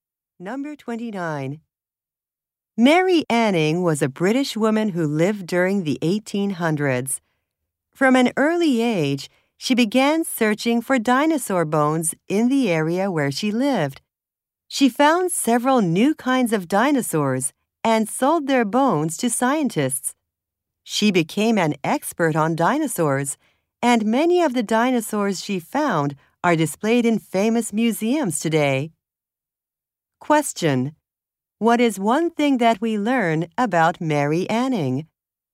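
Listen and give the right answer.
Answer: She found dinosaur bones and became a dinosaur expert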